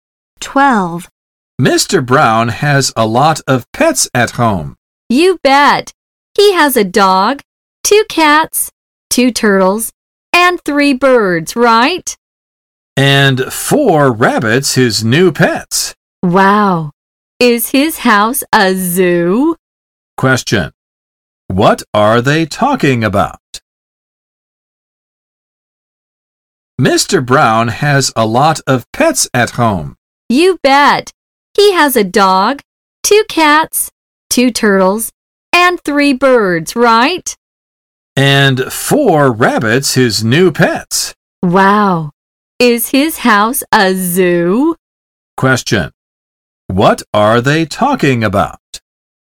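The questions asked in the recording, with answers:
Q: What are they talking about?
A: Mr. Brown's pets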